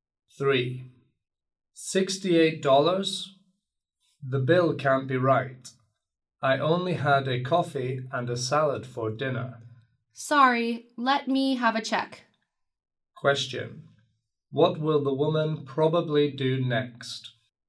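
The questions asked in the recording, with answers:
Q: Question. What will the woman probably do next?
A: Check the bill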